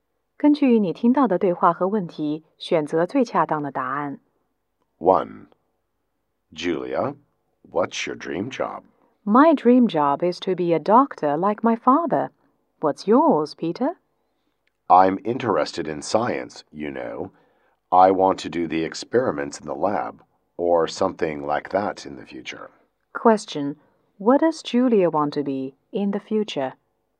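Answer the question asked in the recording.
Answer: A doctor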